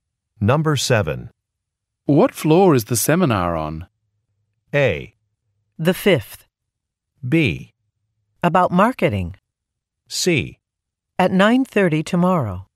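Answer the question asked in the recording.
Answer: A: The fifth.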